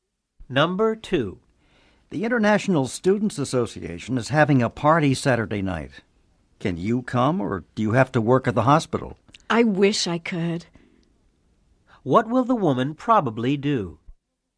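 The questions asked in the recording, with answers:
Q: What will the woman probably do?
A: She will probably work at the hospital, so she can't go to the party.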